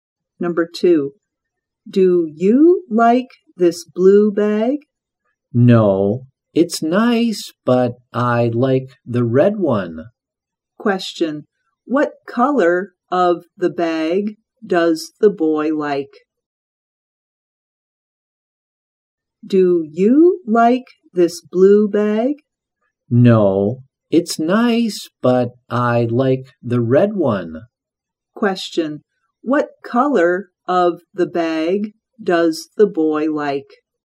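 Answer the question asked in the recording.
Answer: Red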